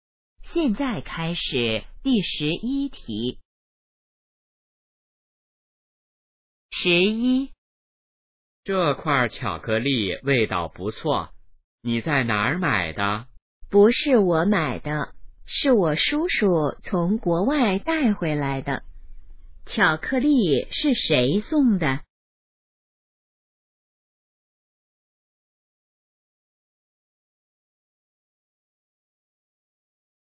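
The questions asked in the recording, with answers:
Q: 巧克力是谁送的?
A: 叔叔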